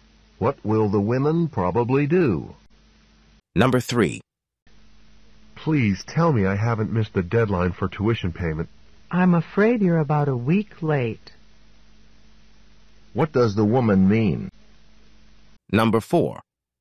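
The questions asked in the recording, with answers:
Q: What does the woman mean?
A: He has missed the tuition payment deadline by about a week.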